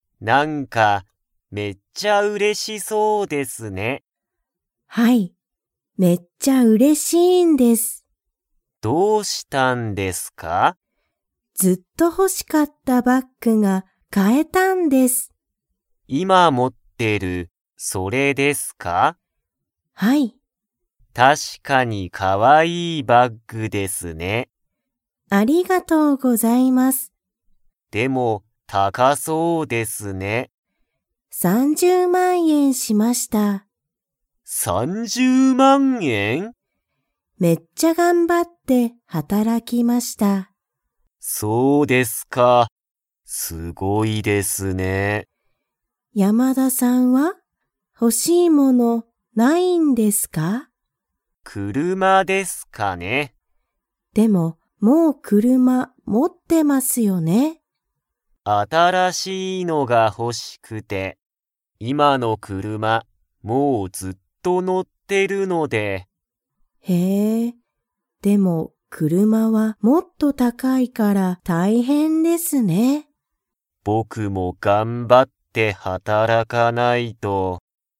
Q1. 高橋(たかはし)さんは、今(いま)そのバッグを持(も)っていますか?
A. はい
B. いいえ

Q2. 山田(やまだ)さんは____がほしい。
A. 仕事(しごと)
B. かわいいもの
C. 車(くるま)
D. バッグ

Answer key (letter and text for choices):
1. A. はい
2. C. 車(くるま)

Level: Level 2